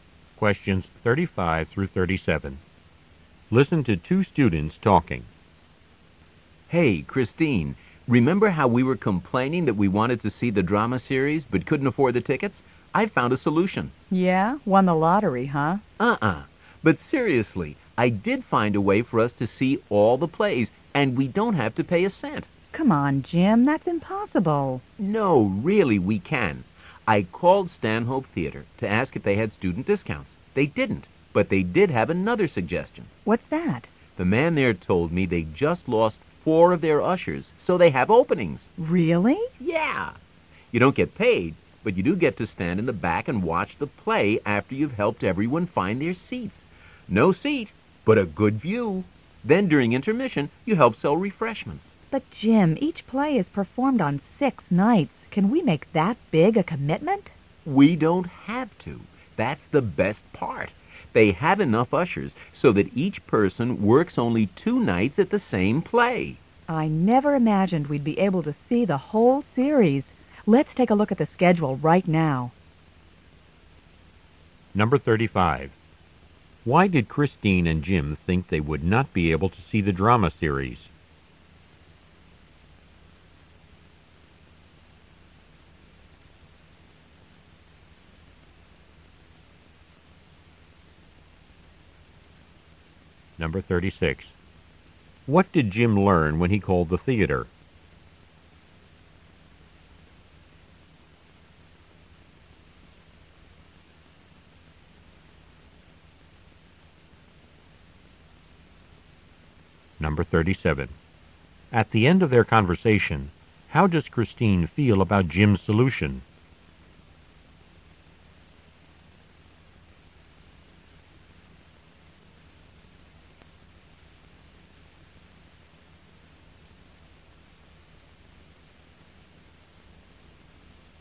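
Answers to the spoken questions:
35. They couldn't afford the tickets
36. The theater needed volunteer ushers
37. Pleased and enthusiastic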